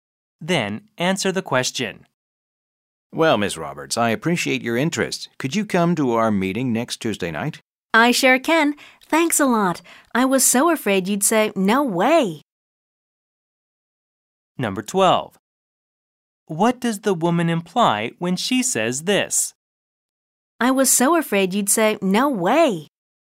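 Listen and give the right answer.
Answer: She had expected him to refuse her request, so she is relieved he agreed.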